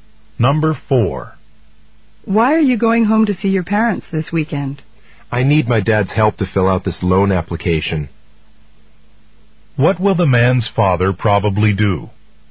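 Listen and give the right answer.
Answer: Help him fill out a loan application.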